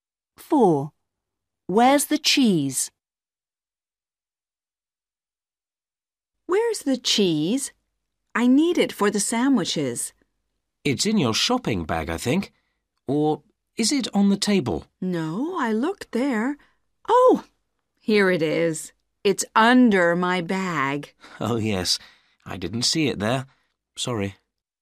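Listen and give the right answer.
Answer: under the bag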